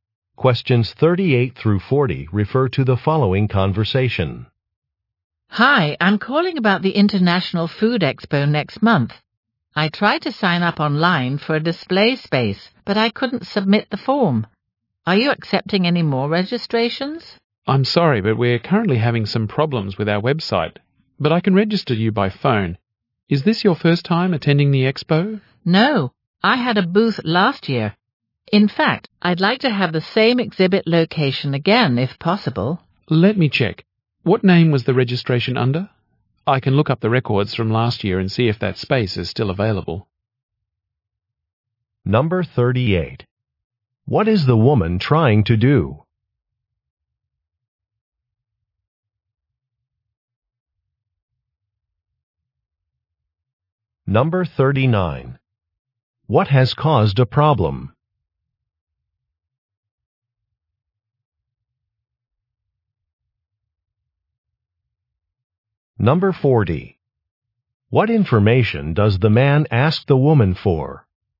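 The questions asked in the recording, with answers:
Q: What is the woman trying to do?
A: Register for a display space at the International Food Expo

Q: What has caused a problem?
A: Problems with the website

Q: What information does the man ask the woman for?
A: The name the registration was under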